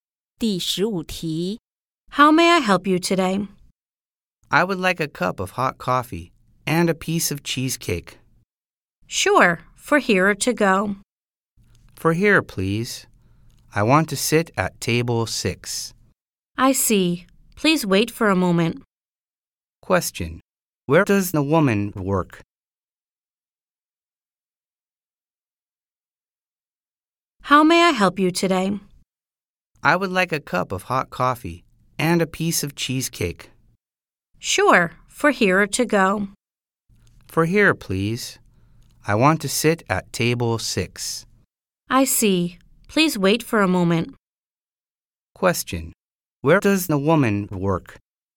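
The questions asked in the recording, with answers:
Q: Where does the woman work?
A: At a café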